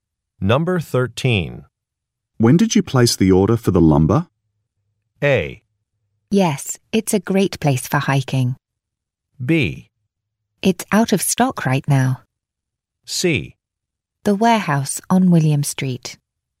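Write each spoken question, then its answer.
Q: When did you place the order for the lumber?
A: B: It's out of stock right now.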